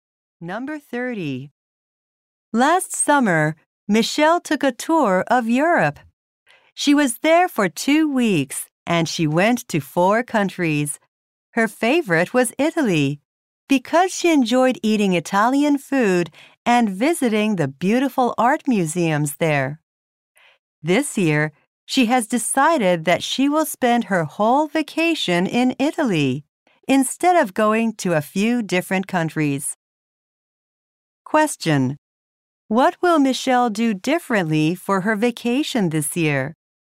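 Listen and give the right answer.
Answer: Spend her whole vacation in Italy.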